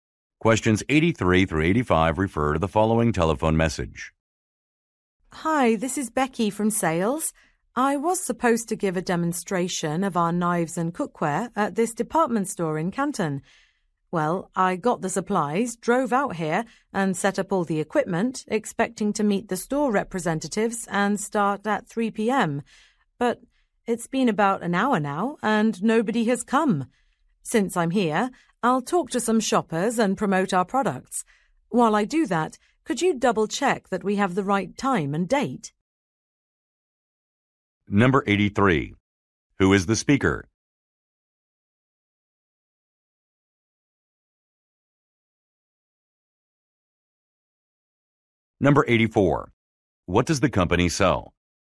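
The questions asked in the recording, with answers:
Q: Who is the speaker?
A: A salesperson

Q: What does the company sell?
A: Knives and cookware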